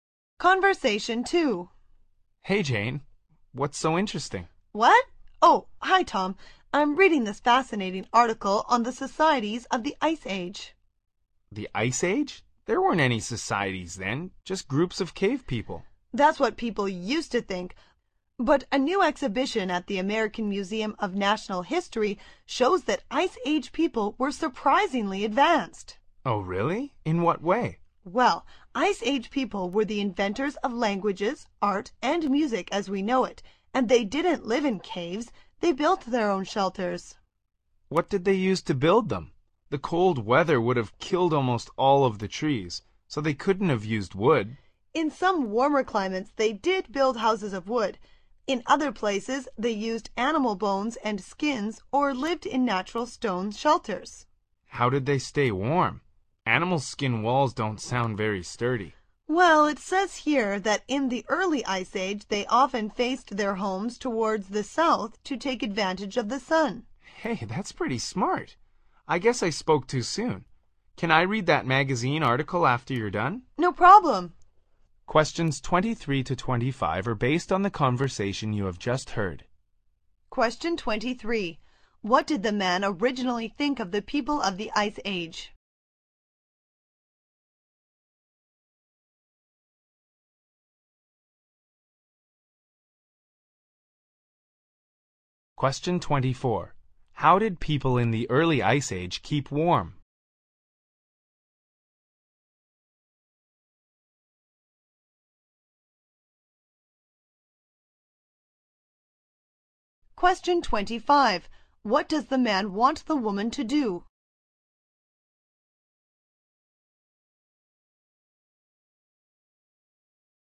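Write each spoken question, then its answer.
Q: What did the man originally think of the people of the Ice Age?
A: They were just groups of cave people, not societies

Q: How did people in the early Ice Age keep warm?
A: They faced their homes south to take advantage of the sun

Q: What does the man want the woman to do?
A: Let him read the magazine article when she is done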